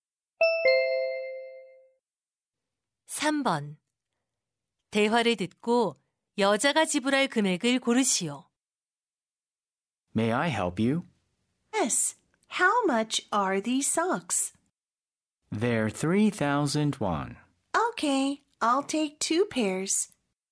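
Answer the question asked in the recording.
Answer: 6,000원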